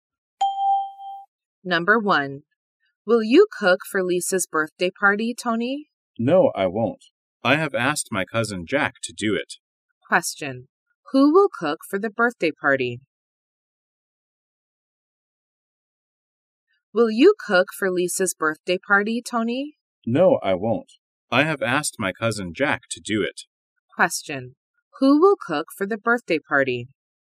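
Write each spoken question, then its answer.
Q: Who will cook for the birthday party?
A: Tony's cousin Jack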